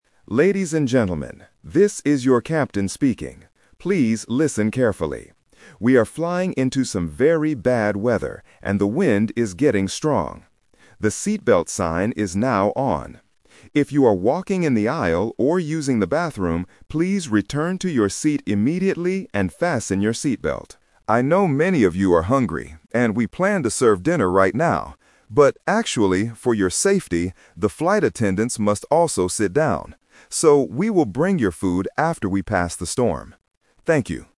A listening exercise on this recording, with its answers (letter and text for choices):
Listen to an announcement from an airplane captain. Choose the correct answer (A, B, or C).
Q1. What is the weather like outside the airplane?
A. It is snowy and cold.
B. It is very windy.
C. It is sunny and clear.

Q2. What does the captain want the passengers to do?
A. Use the bathroom quickly.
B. Go back to their seats.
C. Help the flight attendants.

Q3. When will the passengers get their dinner?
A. Right now.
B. Tomorrow morning.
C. After the storm.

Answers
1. B. It is very windy.
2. B. Go back to their seats.
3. C. After the storm.

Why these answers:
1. The captain clearly describes the bad weather: "...and the wind is getting strong." Trap: Options A and C are distractors. They are weather conditions, but they are not mentioned in the announcement.
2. The captain gives a direct instruction: "...please return to your seat immediately and fasten your seatbelt." Trap: Option A is a trap. The bathroom is mentioned, but passengers who are using the bathroom must leave it and go back to their seats. Option C is not mentioned.
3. The captain says: "So, we will bring your food after we pass the storm." Trap (The Twist): Option A (Right now) is a strong trap. The captain says they planned to serve dinner right now, but they can't because the flight attendants have to sit down safely.

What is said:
Captain: Ladies and gentlemen, this is your captain speaking. Please listen carefully. We are flying into some very bad weather, and the wind is getting strong. The seatbelt sign is now on. If you are walking in the aisle or using the bathroom, please return to your seat immediately and fasten your seatbelt. I know many of you are hungry, and we planned to serve dinner right now. But actually, for your safety, the flight attendants must also sit down. So, we will bring your food after we pass the storm. Thank you.

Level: A2